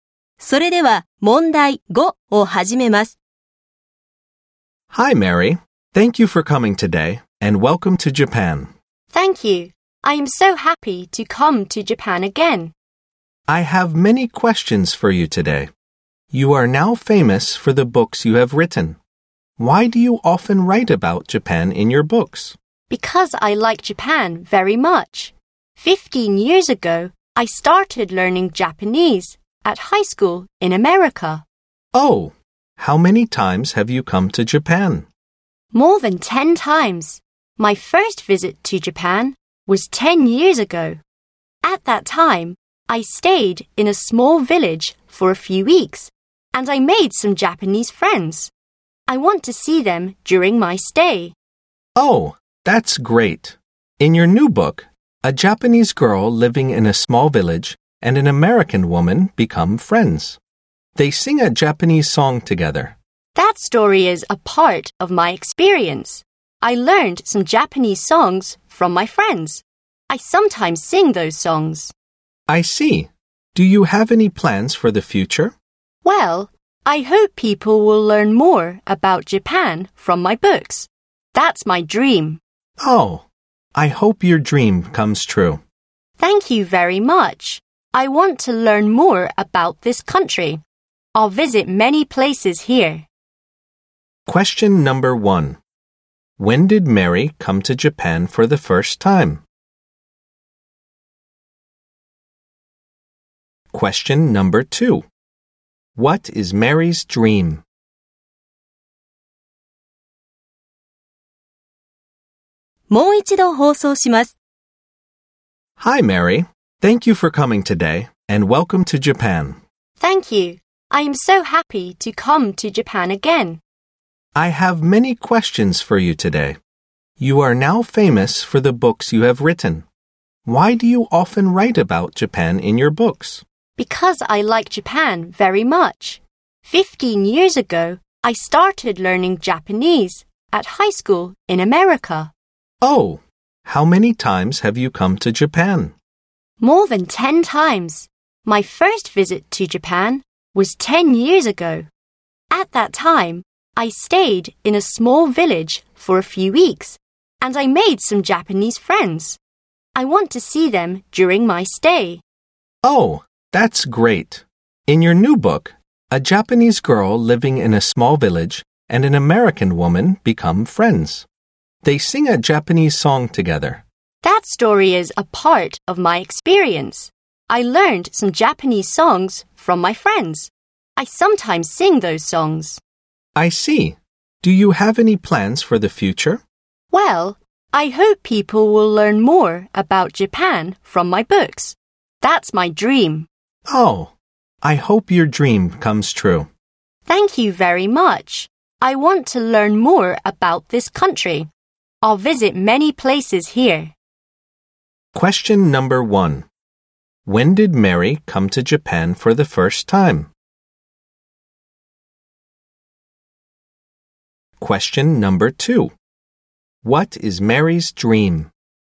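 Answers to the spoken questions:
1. 10 years ago
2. That people will learn more about Japan from her books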